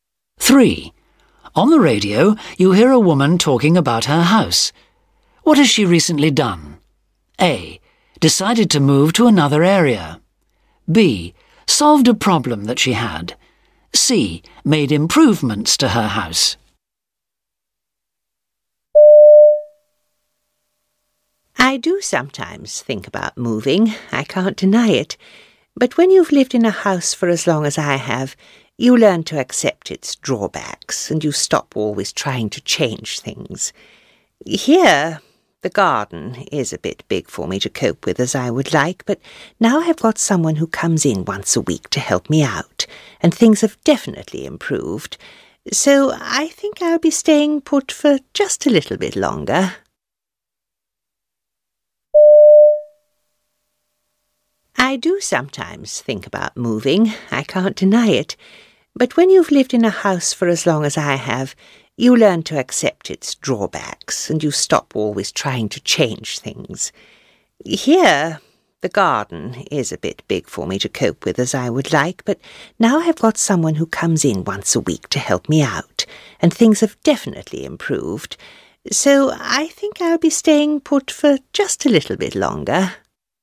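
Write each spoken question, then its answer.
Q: What has she recently done?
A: B: Solved a problem that she had.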